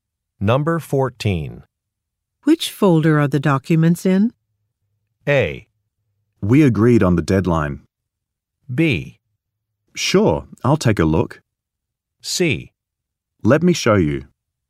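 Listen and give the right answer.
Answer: C: Let me show you.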